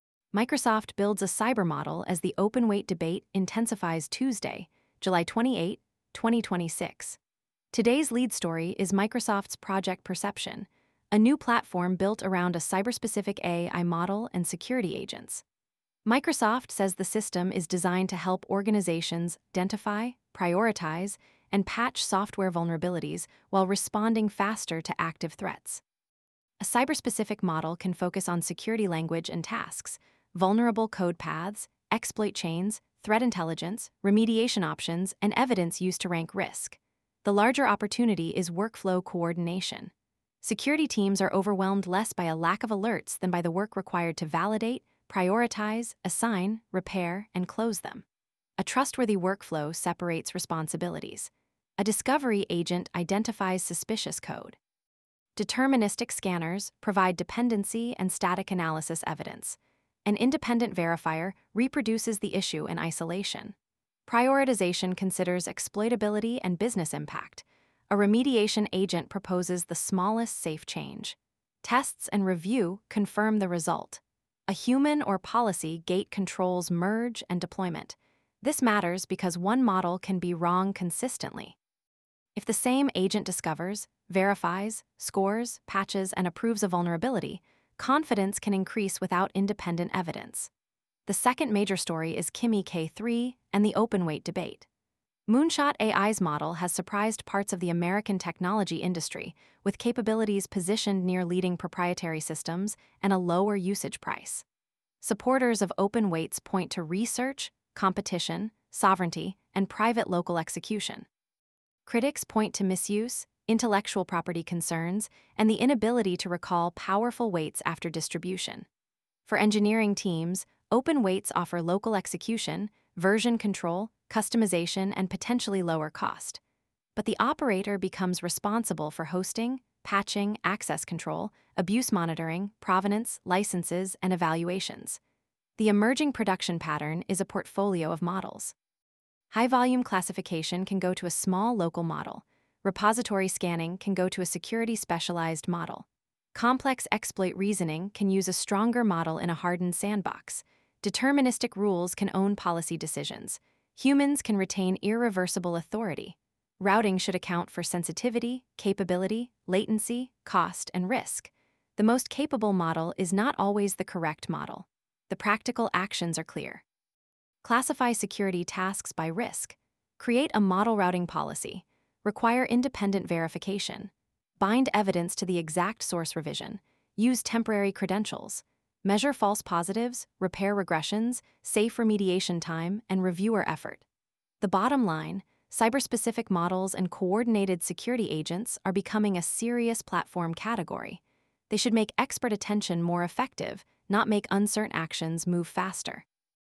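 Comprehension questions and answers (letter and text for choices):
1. What is Project Perception designed to support?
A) Cybersecurity work such as identifying, prioritising, and patching vulnerabilities and responding to threats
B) Generating entertainment videos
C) Replacing all deterministic security tools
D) Publishing model weights without controls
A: A) Cybersecurity work such as identifying, prioritising, and patching vulnerabilities and responding to threats

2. Why should discovery and verification be separated?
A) Independent evidence reduces the risk of one agent reinforcing its own mistake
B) Verification prevents agents from reading code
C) The same agent is always guaranteed to be correct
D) Separation removes the need for tests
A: A) Independent evidence reduces the risk of one agent reinforcing its own mistake

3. What is one benefit of an open-weight model for engineering teams?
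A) Local execution for sensitive workloads and greater control over deployment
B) No responsibility for security or maintenance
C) Automatic legal compliance in every country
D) Guaranteed superiority over managed models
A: A) Local execution for sensitive workloads and greater control over deployment

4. What does a model-routing policy consider?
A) Data sensitivity, capability, latency, cost, and risk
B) Only the model's brand name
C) Only the largest available context window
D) The number of social-media mentions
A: A) Data sensitivity, capability, latency, cost, and risk

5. Which authority model is safest for a security agent?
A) Task-scoped, short-lived credentials with approval for privileged actions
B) Permanent unrestricted production credentials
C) Shared administrator passwords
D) No action logging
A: A) Task-scoped, short-lived credentials with approval for privileged actions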